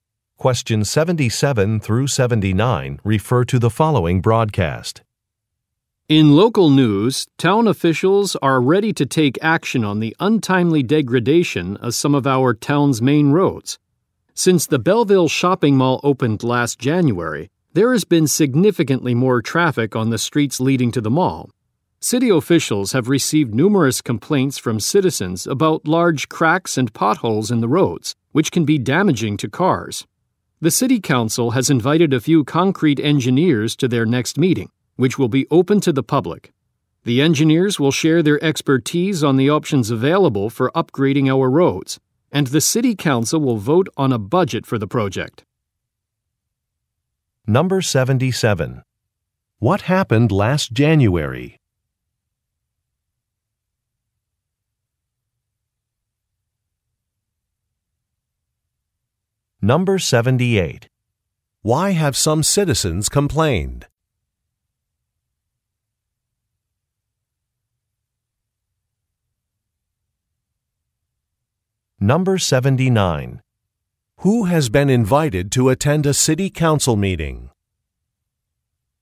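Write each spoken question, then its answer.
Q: What happened last January?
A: The Belleville Shopping Mall opened.

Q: Why have some citizens complained?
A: Roads have large cracks and potholes that can damage cars.

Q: Who has been invited to attend a city council meeting?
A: Concrete engineers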